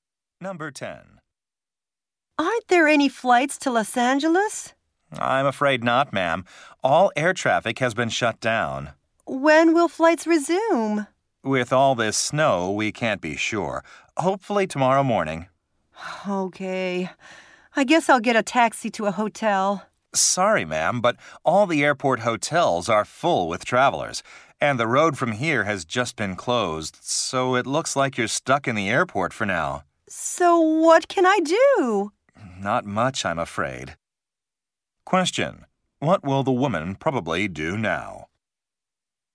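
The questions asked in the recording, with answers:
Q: What will the woman probably do now?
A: Stay in the airport.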